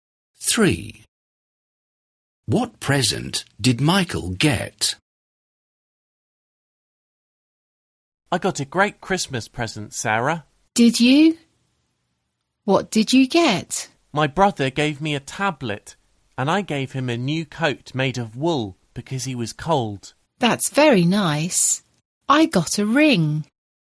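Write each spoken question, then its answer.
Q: What present did Michael get?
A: a tablet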